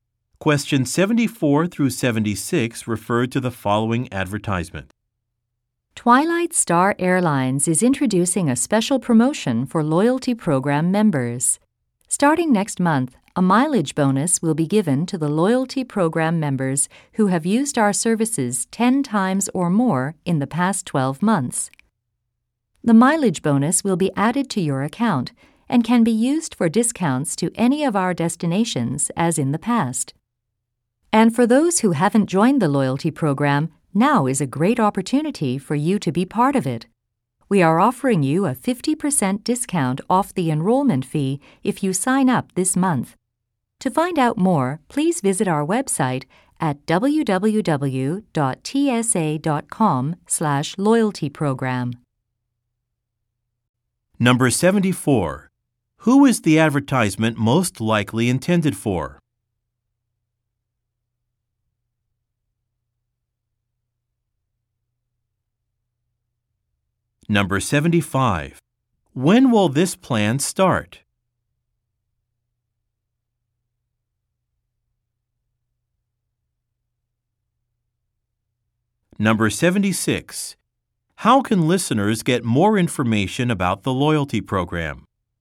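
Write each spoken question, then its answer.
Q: Who is the advertisement most likely intended for?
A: Airline passengers / loyalty program members

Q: When will this plan start?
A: Next month

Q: How can listeners get more information about the loyalty program?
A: By visiting the website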